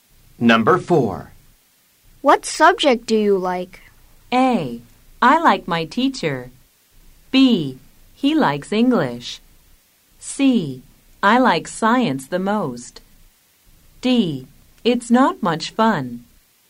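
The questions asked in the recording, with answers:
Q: What subject do you like?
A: C: I like science the most.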